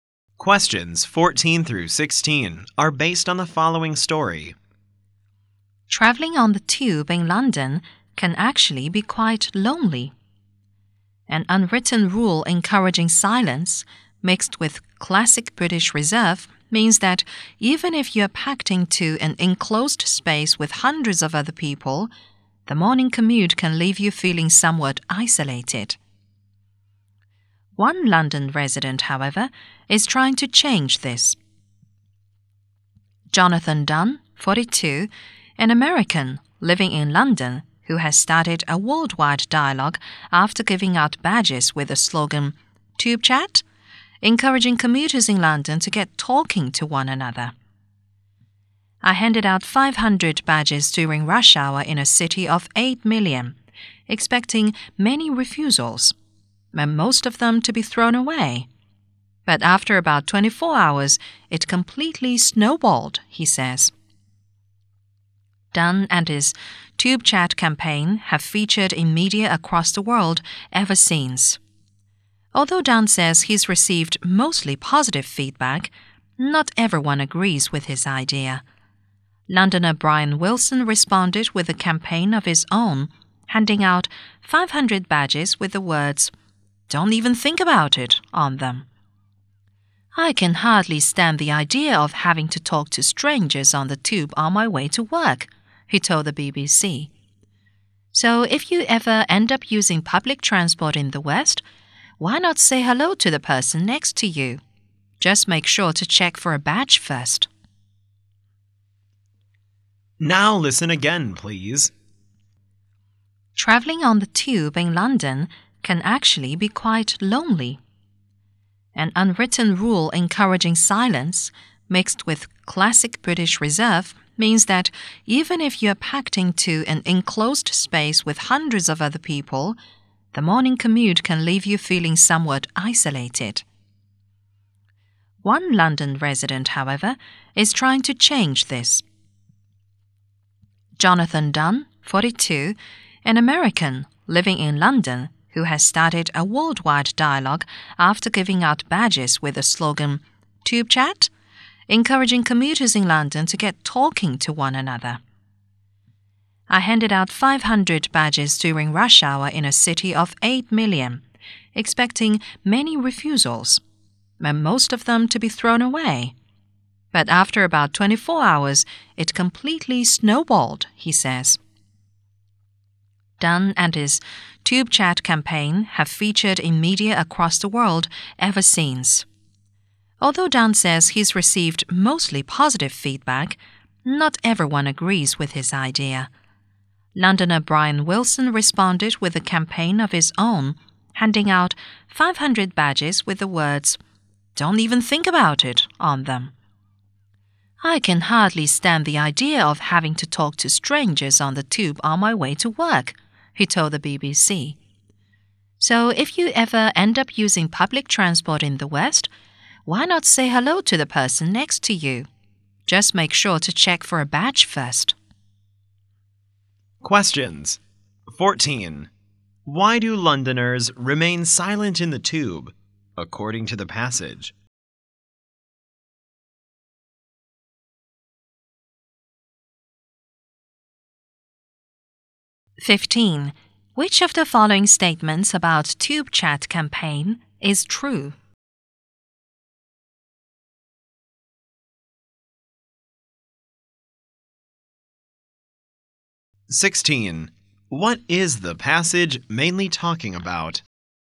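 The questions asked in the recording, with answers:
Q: Why do Londoners remain silent in the tube, according to the passage?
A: Because of an unwritten rule encouraging silence and British reserve.

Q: What is the passage mainly talking about?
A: The Tube Chat campaign encouraging London commuters to talk to each other.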